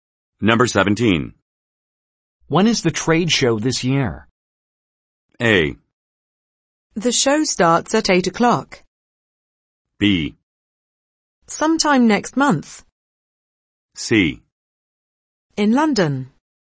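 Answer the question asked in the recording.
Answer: B: Sometime next month.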